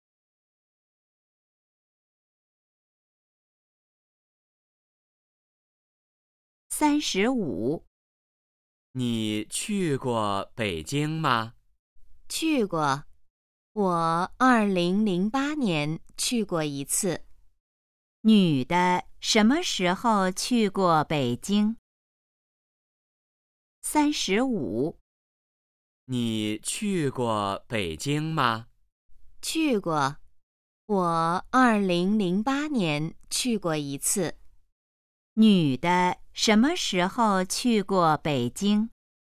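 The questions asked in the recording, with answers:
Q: 女的什么时候去过北京?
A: 2008年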